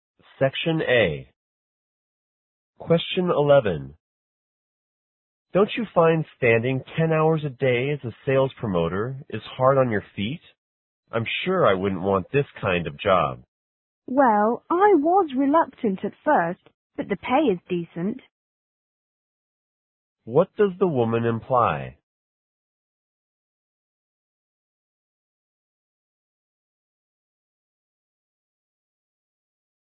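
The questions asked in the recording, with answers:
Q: What does the woman imply?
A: She doesn't mind the job much because the pay is decent.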